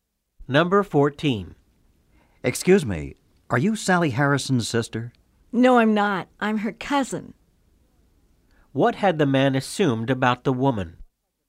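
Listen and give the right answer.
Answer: That she was Sally Harrison's sister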